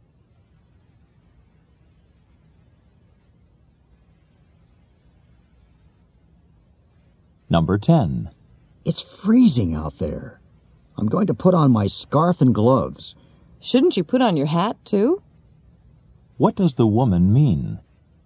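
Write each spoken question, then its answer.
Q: What does the woman mean?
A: The man should wear his hat too.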